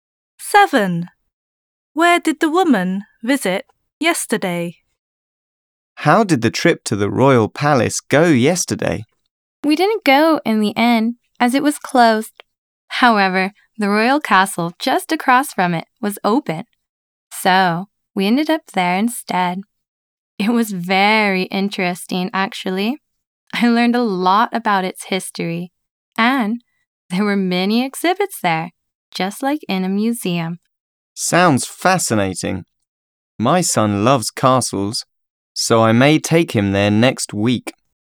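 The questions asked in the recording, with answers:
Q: Where did the woman visit yesterday?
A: The royal castle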